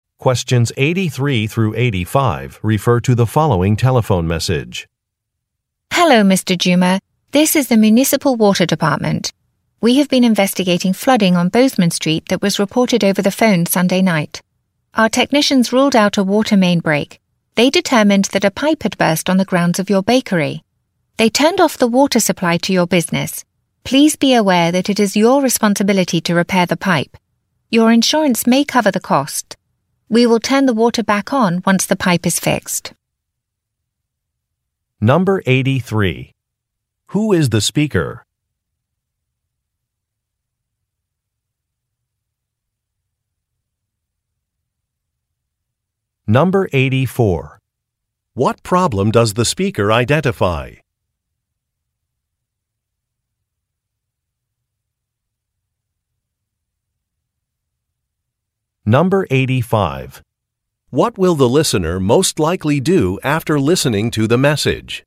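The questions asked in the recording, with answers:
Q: Who is the speaker?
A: An employee of the Municipal Water Department

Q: What problem does the speaker identify?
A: A pipe burst on the grounds of the listener's bakery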